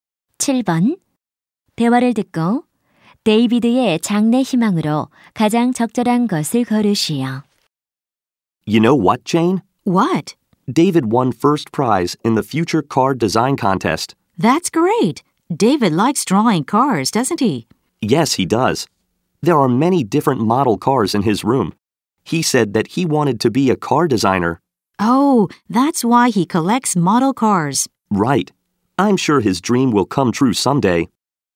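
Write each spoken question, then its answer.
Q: 대화를 듣고 데이비드의 장래 희망으로 가장 적절한 것을 고르시오.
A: 자동차 디자이너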